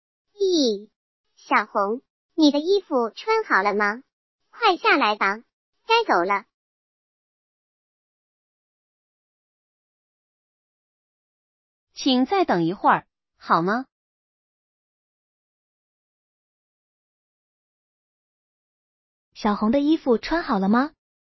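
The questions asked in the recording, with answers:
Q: 小红的衣服穿好了吗?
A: 还没穿好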